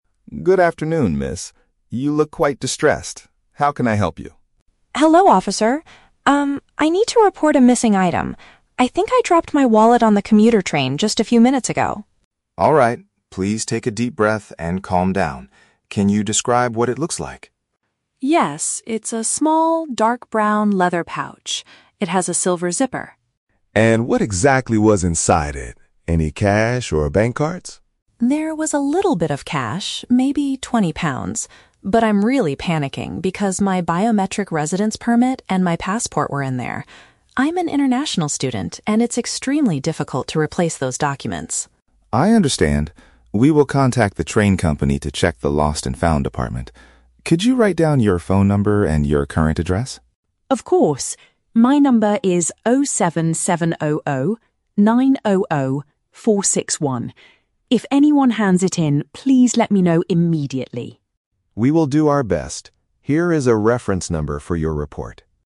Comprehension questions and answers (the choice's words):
Listen to the conversation between an international student and a police officer. Read the questions below and choose the correct answer (A, B, or C) for each.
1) Where does the student believe she lost her belongings?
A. On a form of public transportation.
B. At the station's lost and found department.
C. Inside a local bank branch.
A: On a form of public transportation.

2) What is the main reason the student is so frightened?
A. She lost a very large amount of cash.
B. She cannot easily get new identification papers.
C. She needs to catch an international flight today.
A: She cannot easily get new identification papers.

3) What does the police officer ask the student to provide?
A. A physical description of the person who stole the item.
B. The official reference number of her student visa.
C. Her personal contact details and place of living.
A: Her personal contact details and place of living.

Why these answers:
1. The Key (Correct): The student says, "I dropped my wallet on the commuter train." (Paraphrased: commuter train = a form of public transportation). The Trap: Option (B) is incorrect. The officer mentions the "lost and found department," but that is where the officer will check, not where the student lost the wallet. Not mentioned: Option (C) is a trap. The officer asks about "bank cards," but a bank branch is never mentioned.
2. The Key (Correct): The student says her BRP and passport (identification papers) were inside, and that "it's extremely difficult to replace those documents" (cannot easily get new ones). The Trap: Option (A) is incorrect. She says there was only "a little bit of cash, maybe twenty pounds", not a large amount. Not mentioned: Option (C) is a plausible reason to panic about a passport, but flying is not mentioned in the dialogue.
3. The Key (Correct): The officer asks her to write down her "phone number and your current address." (Paraphrased: phone number = contact details; current address = place of living). The Trap: Option (B) is a trap using the words "reference number." The officer gives her a reference number for the police report at the very end; he does not ask for her visa reference number. Not mentioned: Option (A) is a trap. The item was "dropped," not stolen, so there is no thief to describe.

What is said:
Officer: Good afternoon, miss. You look quite distressed. How can I help you?
Student: Hello, officer. Um, I need to report a missing item. I think I dropped my wallet on the commuter train just a few minutes ago!
Officer: Alright, please take a deep breath and calm down. Can you describe what it looks like?
Student: Yes, it's a small, dark brown leather pouch. It has a silver zipper.
Officer: And what exactly was inside it? Any cash or bank cards?
Student: There was a little bit of cash, maybe twenty pounds. But I'm really panicking because my Biometric Residence Permit and my passport were in there. I'm an international student, and it's extremely difficult to replace those documents!
Officer: I understand. We will contact the train company to check the lost and found department. Could you write down your phone number and your current address?
Student: Of course. If anyone hands it in, please let me know immediately.